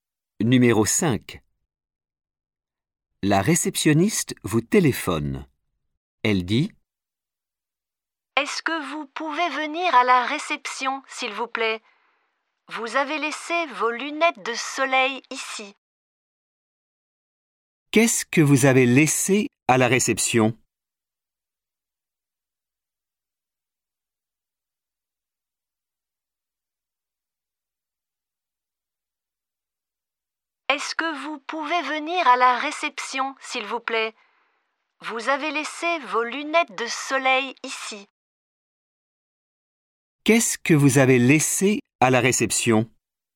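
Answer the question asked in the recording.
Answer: Vos lunettes de soleil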